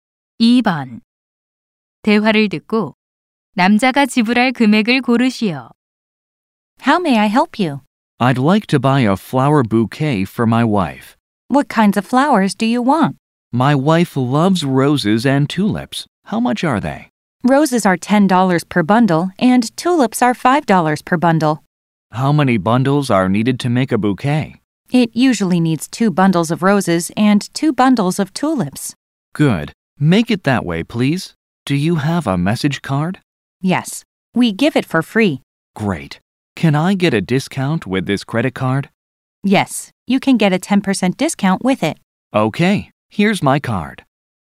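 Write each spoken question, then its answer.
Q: 대화를 듣고 남자가 지불할 금액을 고르시오.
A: $27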